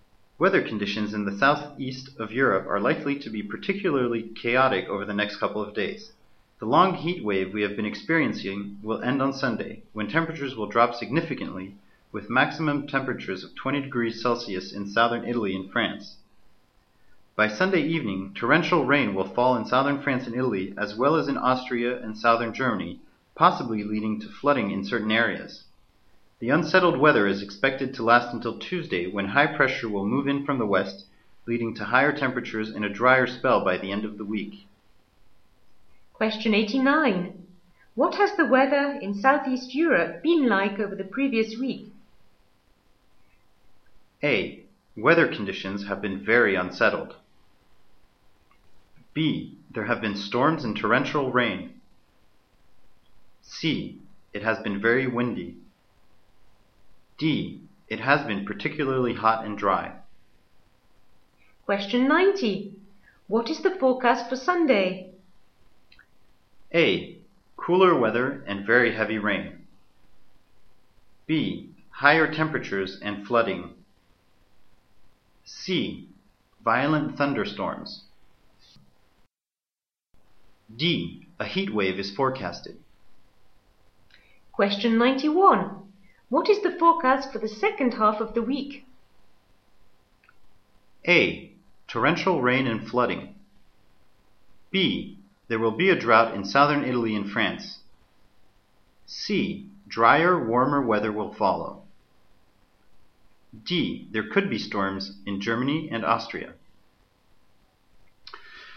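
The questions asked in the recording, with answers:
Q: What has the weather in Southeast Europe been like over the previous week?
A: D: It has been particularly hot and dry.

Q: What is the forecast for Sunday?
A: A: Cooler weather and very heavy rain.

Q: What is the forecast for the second half of the week?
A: C: Drier, warmer weather will follow.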